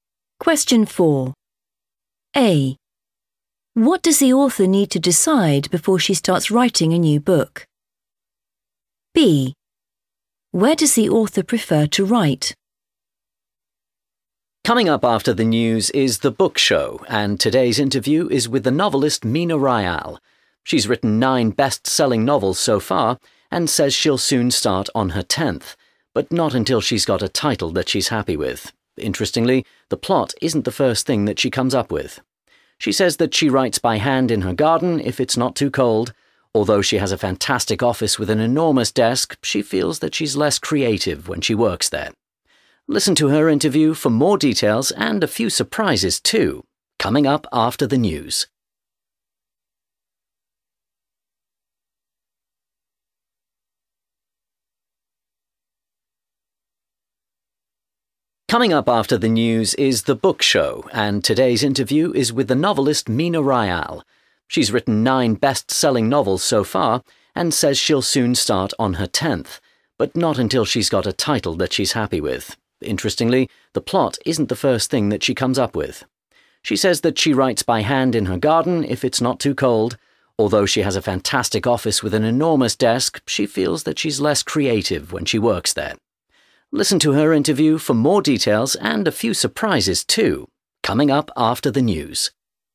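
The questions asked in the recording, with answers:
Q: What does the author need to decide before she starts writing a new book?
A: a title

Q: Where does the author prefer to write?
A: in her garden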